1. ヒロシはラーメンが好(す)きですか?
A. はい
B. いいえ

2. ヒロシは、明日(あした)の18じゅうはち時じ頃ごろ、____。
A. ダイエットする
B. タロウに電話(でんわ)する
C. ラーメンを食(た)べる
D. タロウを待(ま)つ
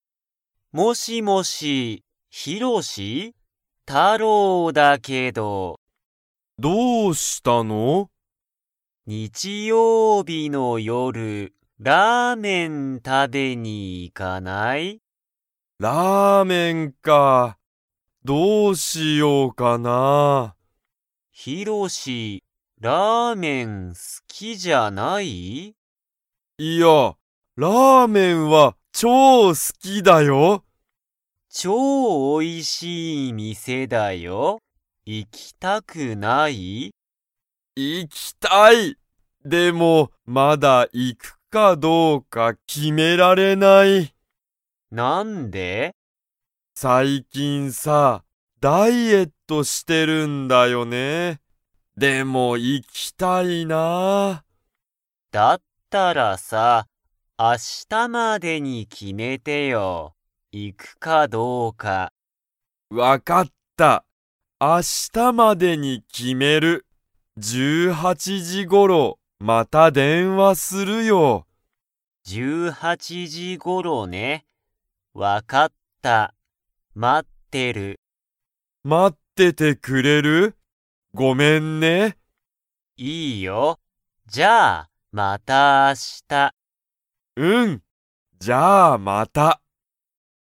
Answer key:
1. はい
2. タロウに電話(でんわ)する

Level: Level 2

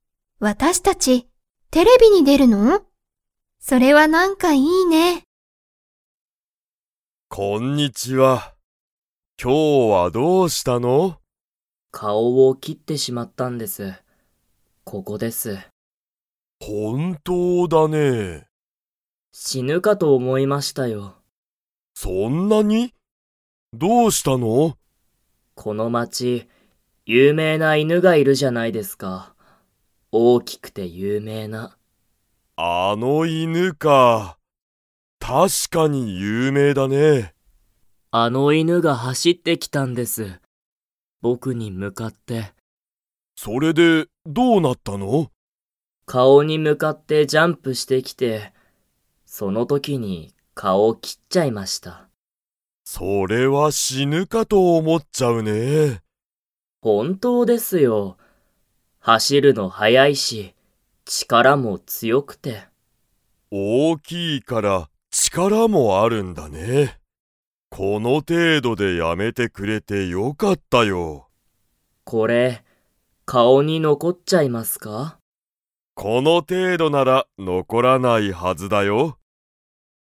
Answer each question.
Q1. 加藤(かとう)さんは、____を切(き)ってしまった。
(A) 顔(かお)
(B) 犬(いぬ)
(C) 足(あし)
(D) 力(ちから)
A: 顔(かお)

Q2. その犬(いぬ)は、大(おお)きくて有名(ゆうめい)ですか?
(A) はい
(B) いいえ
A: はい

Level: Level 2

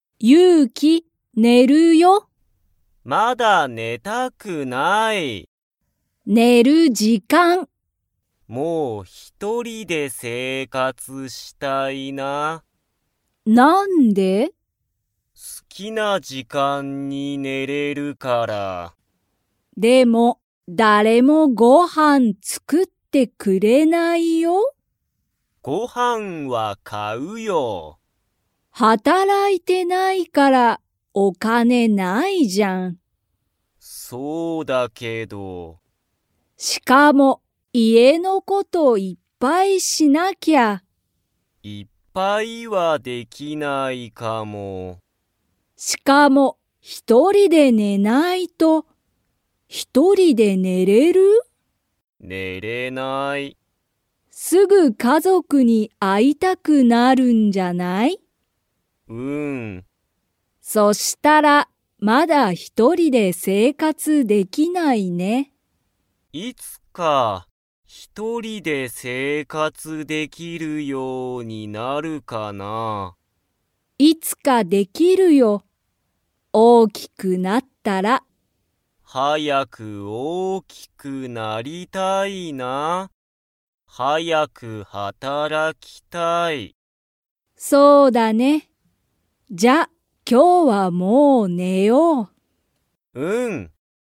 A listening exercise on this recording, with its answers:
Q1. ゆうきは、働(はたら)いてないから____がない。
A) 時間(じかん)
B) 生活(せいかつ)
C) 家族(かぞく)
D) お金(かね)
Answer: お金(かね)

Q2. ゆうきは一人(ひとり)で寝(ね)れますか?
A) はい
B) いいえ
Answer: いいえ

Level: Level 2

